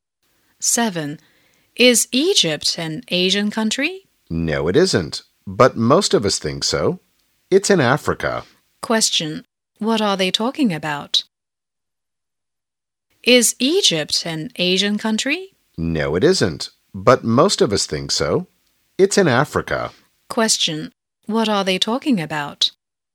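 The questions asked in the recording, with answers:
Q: What are they talking about?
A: Where Egypt is / which continent Egypt is in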